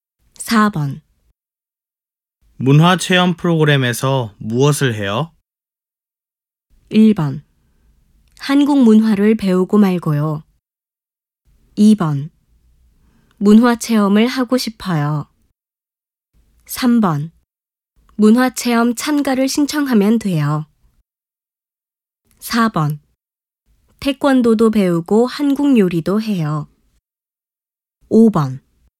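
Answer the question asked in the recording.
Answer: 4: 태권도도 배우고 한국 요리도 해요.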